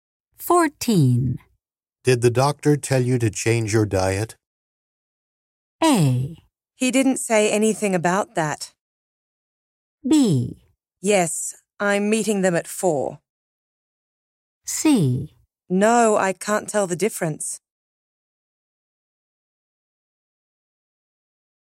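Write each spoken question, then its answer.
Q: Did the doctor tell you to change your diet?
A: A: He didn't say anything about that.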